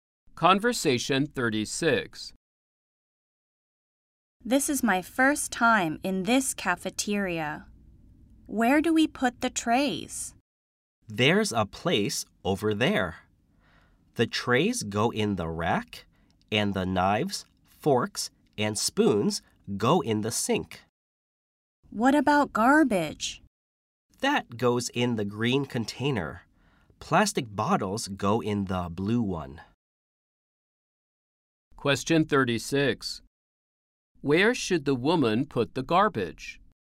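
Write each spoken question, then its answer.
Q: Where should the woman put the garbage?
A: In the green container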